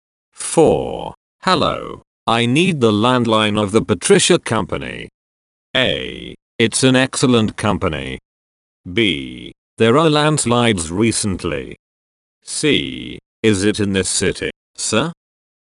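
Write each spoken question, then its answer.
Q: Hello, I need the landline of the Patricia Company.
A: C: Is it in this city, sir?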